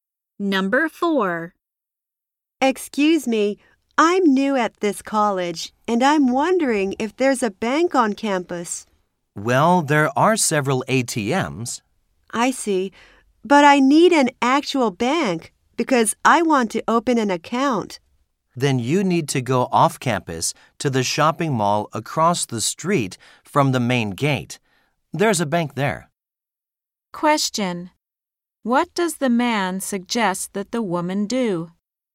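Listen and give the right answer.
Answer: Go to the bank at the shopping mall off campus.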